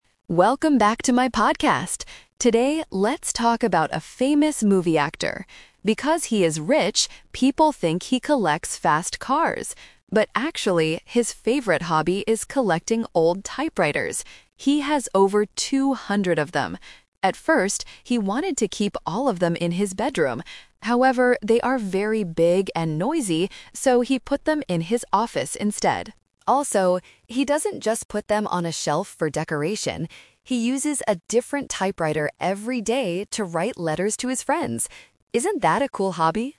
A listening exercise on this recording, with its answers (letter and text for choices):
Listen to a podcast about a famous actor's hobby. Choose the correct answer (A, B, or C).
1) What does the movie actor actually collect?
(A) Fast cars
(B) Old typewriters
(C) Famous movies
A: (B) Old typewriters

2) Where does the actor keep his collection?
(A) In his bedroom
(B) In his garage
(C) In his office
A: (C) In his office

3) What does the actor do with his collection?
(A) He uses it to write letters.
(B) He puts it on a shelf for decoration.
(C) He gives it to his friends.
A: (A) He uses it to write letters.

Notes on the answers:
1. The podcaster clearly states his real hobby: "...actually, his favorite hobby is collecting old typewriters!" Trap (The Twist): Option A (Fast cars) is a strong trap. The audio mentions fast cars, but that is what people think he collects, not what he actually collects.
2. The podcaster explains the final location: "...so he put them in his office instead." Trap (The Twist): Option A (In his bedroom) is the trap. He wanted to keep them in his bedroom at first, but changed his mind because they are big and noisy. Option B is not mentioned.
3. The audio confirms his daily activity: "He uses a different typewriter every day to write letters to his friends." Trap: Option B (puts it on a shelf for decoration) is what he doesn't do ("he doesn't just put them on a shelf for decoration"). Option C is a distractor because he writes letters to his friends, he doesn't give the typewriters to them.

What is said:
Podcaster: Welcome back to my podcast! Today, let's talk about a famous movie actor. Because he is rich, people think he collects fast cars. But actually, his favorite hobby is collecting old typewriters! He has over two hundred of them. At first, he wanted to keep all of them in his bedroom. However, they are very big and noisy, so he put them in his office instead. Also, he doesn't just put them on a shelf for decoration. He uses a different typewriter every day to write letters to his friends. Isn't that a cool hobby?

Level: A2